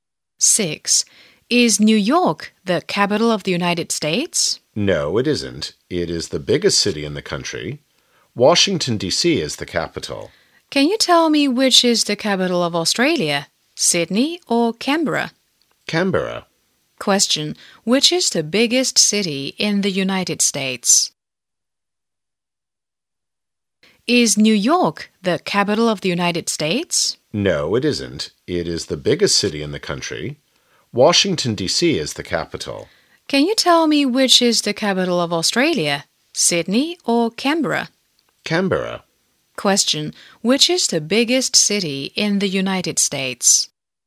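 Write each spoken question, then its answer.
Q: Which is the biggest city in the United States?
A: New York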